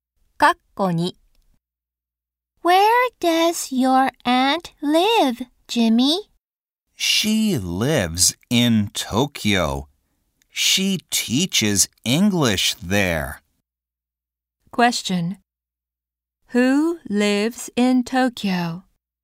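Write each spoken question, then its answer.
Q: Who lives in Tokyo?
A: Jimmy's aunt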